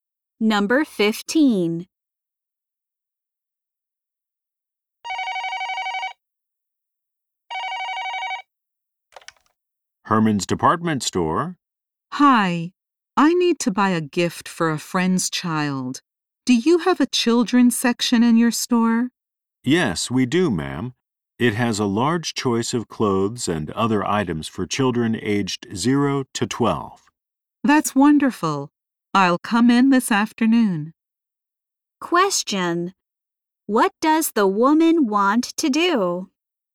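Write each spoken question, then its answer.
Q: What does the woman want to do?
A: Buy a gift for a friend's child.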